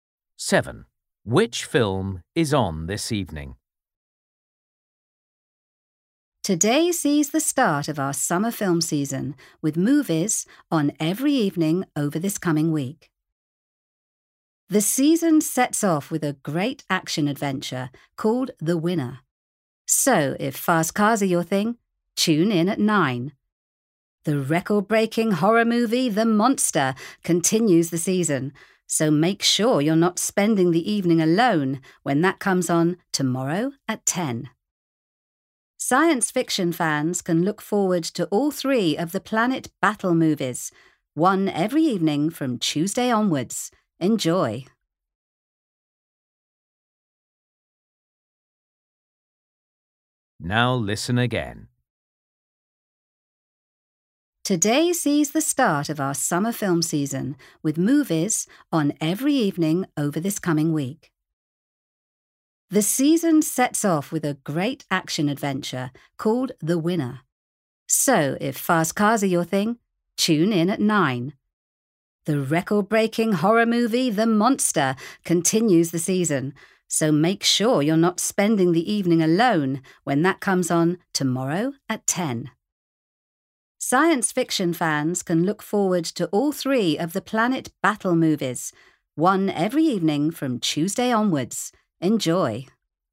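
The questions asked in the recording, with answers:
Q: Which film is on this evening?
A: The Winner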